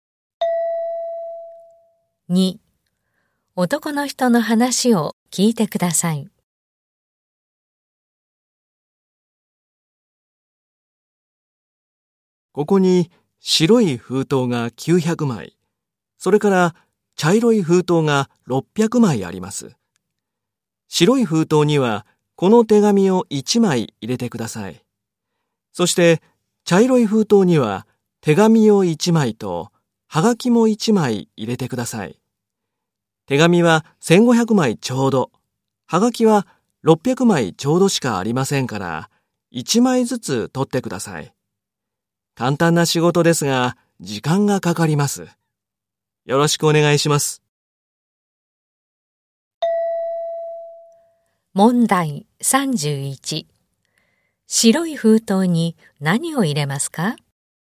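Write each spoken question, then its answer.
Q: 白い封筒に何を入れますか?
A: 手紙1枚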